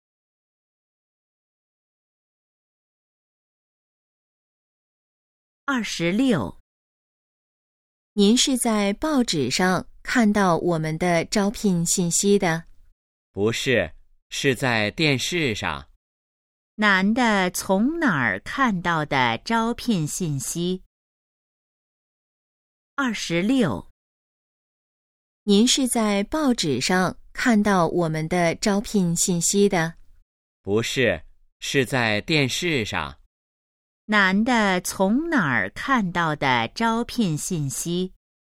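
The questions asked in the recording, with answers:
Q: 男的从哪儿看到的招聘信息?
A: 电视上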